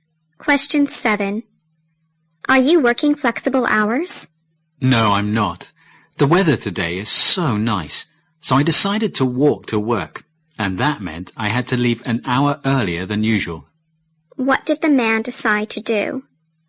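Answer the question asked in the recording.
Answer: To walk to work.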